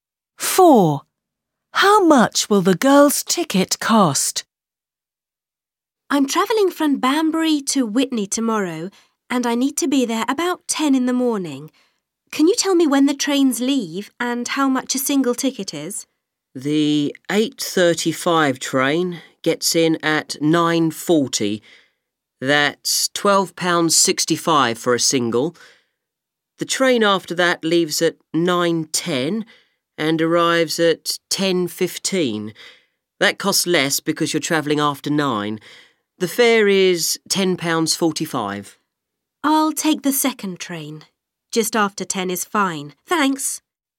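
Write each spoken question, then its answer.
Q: Four. How much will the girl's ticket cost?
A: £10.45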